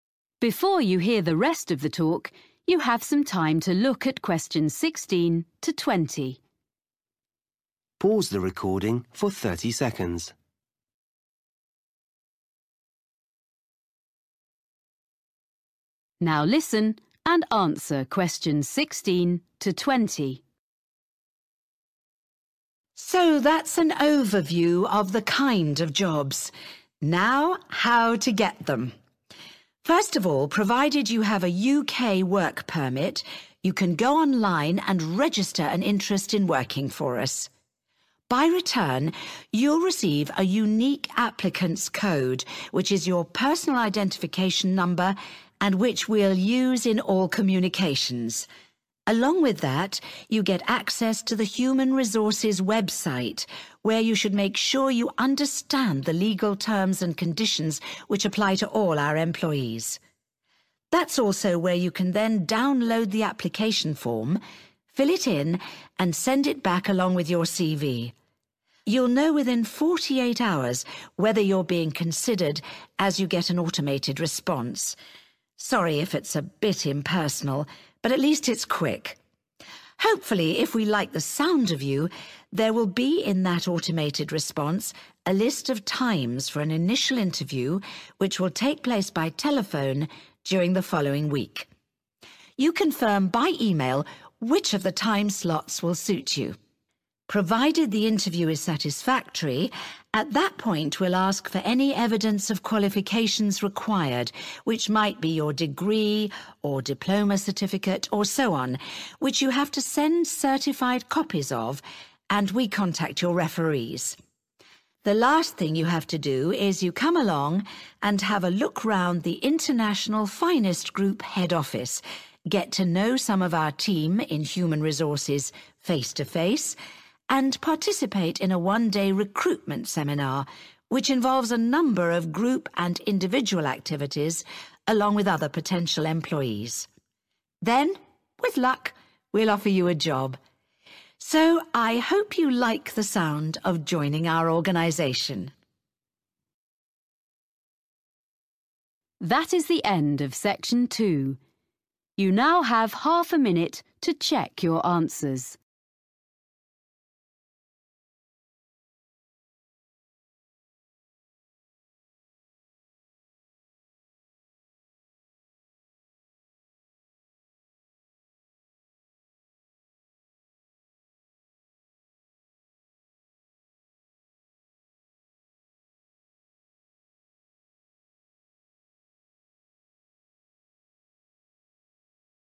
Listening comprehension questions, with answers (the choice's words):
Choose FIVE answers from the list and write the correct letter A-G next to questions 16-20.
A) CV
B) names of referees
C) work permit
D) recruitment seminar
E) evidence of qualifications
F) conditions of employment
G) initial interview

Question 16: Receive personal code and check (16)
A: conditions of employment

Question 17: Send in form and attach (17)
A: CV

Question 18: Receive reply and confirm (18)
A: initial interview

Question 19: Send in (19)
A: evidence of qualifications

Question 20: Attend (20)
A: recruitment seminar